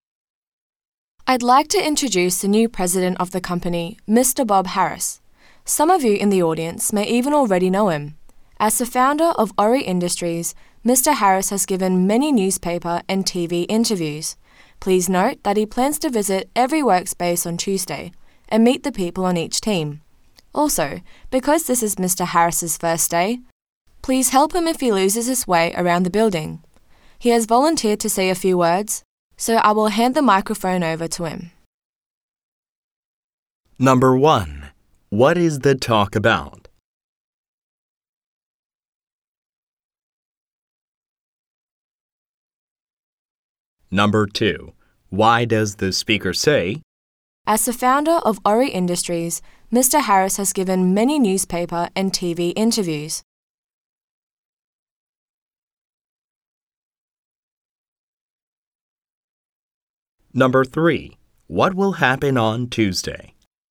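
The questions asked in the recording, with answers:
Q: What is the talk about?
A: Introducing the company's new president, Bob Harris

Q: What will happen on Tuesday?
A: Mr. Harris will visit every workspace and meet each team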